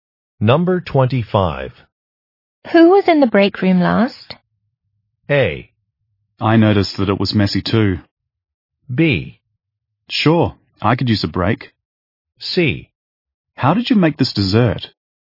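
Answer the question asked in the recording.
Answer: A: I noticed that it was messy too.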